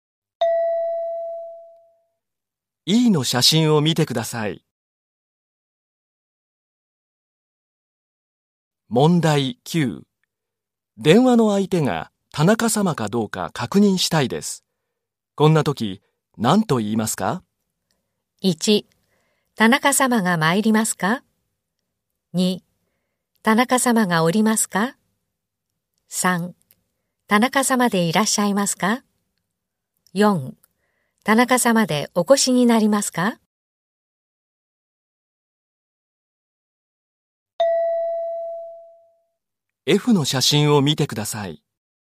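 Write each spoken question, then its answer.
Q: 電話の相手が田中様かどうか確認したいです。こんな時、何と言いますか?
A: 3: 田中様でいらっしゃいますか?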